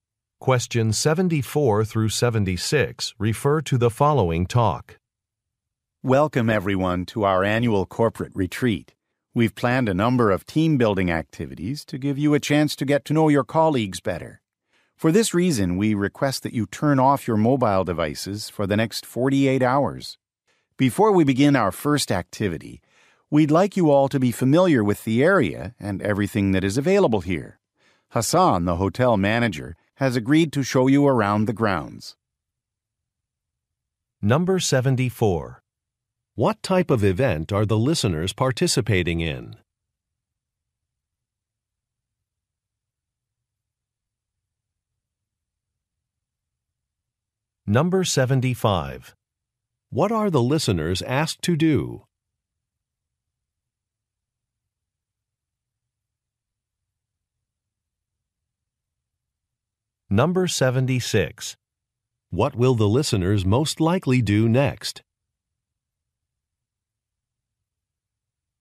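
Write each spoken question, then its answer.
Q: What type of event are the listeners participating in?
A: An annual corporate retreat

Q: What are the listeners asked to do?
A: Turn off their mobile devices

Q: What will the listeners most likely do next?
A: Take a tour of the grounds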